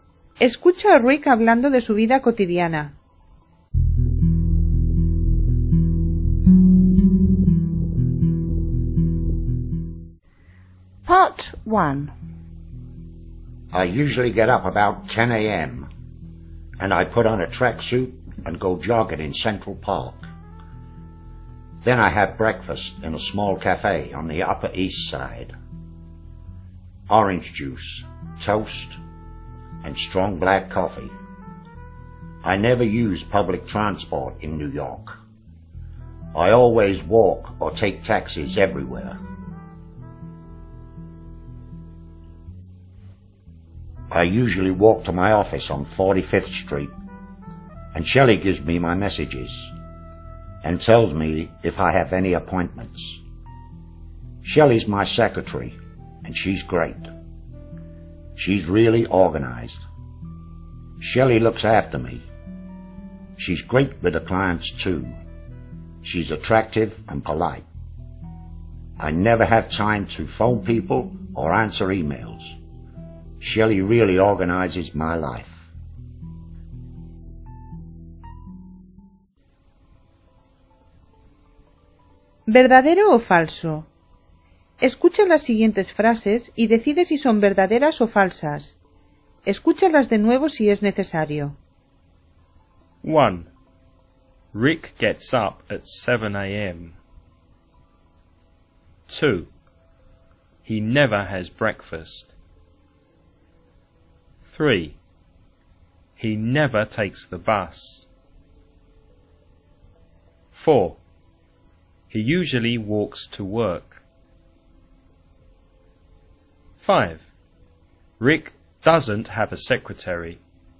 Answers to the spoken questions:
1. False.
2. False. He has breakfast in a small cafe.
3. True. He never uses public transport.
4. True.
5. False. Her name's Shelley.